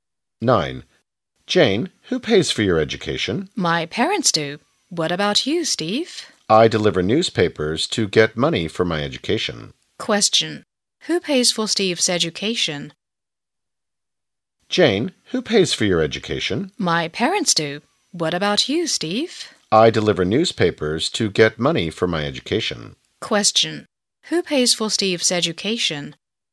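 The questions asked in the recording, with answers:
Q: Who pays for Steve's education?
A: He does, by delivering newspapers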